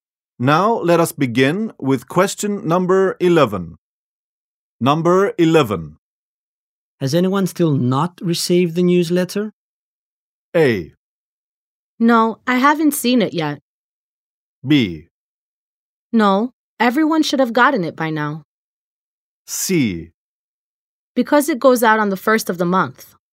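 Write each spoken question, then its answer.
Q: Has anyone still not received the newsletter?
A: B: No, everyone should have gotten it by now.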